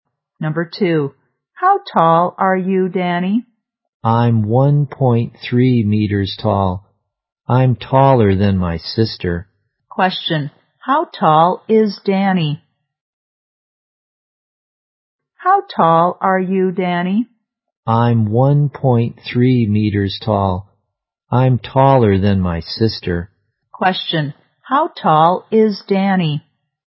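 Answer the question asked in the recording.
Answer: 1.3 meters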